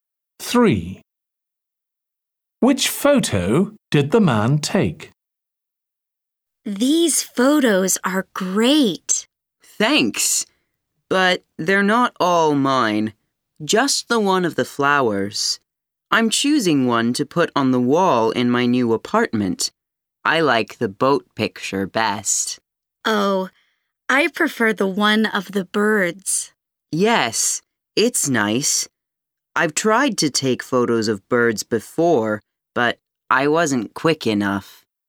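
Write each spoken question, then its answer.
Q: Which photo did the man take?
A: the one of the flowers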